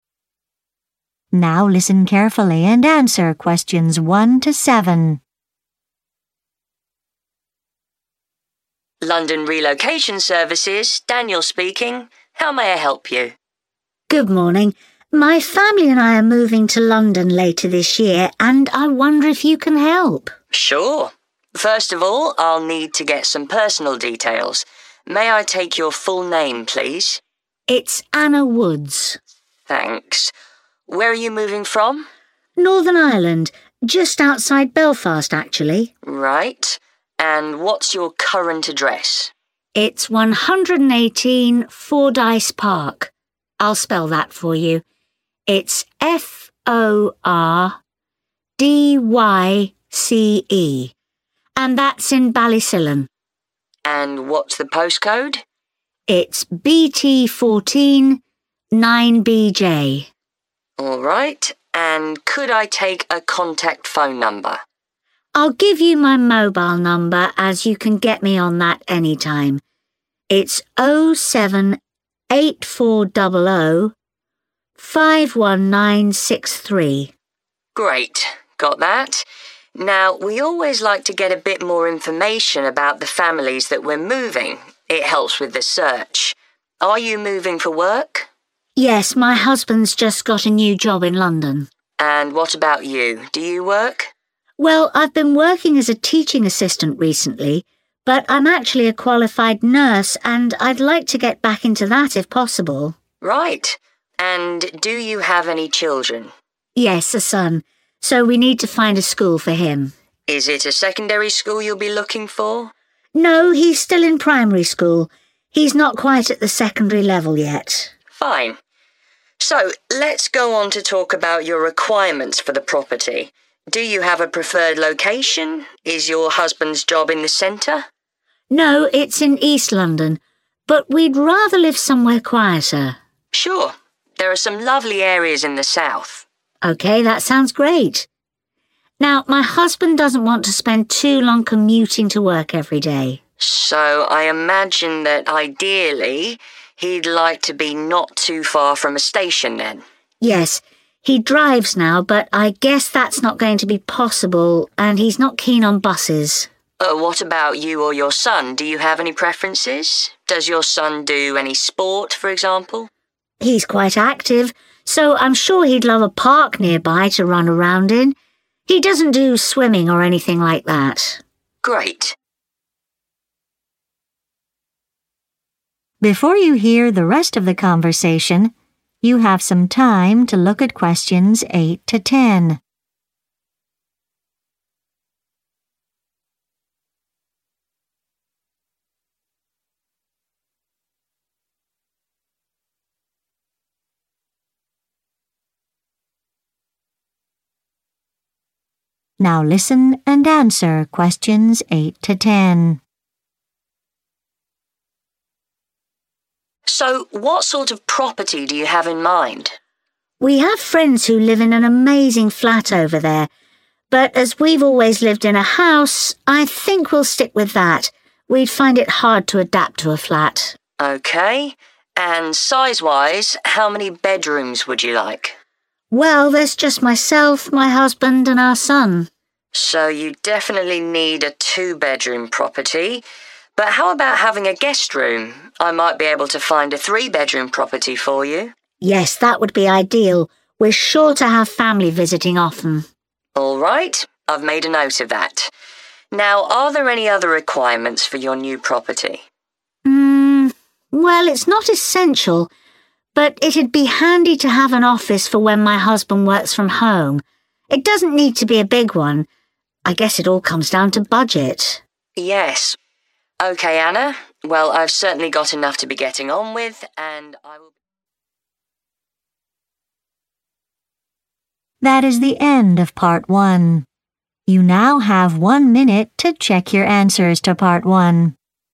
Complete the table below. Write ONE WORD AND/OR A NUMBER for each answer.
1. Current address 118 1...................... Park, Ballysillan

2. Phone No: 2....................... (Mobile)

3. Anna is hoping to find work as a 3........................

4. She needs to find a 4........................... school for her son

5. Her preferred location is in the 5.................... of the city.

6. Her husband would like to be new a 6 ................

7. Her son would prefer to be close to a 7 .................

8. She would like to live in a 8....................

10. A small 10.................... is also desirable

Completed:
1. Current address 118 Fordyce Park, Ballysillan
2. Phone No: 07840051963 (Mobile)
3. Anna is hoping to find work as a nurse
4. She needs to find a primary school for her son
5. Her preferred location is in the south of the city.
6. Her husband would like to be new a station
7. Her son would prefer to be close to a park
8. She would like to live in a house
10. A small office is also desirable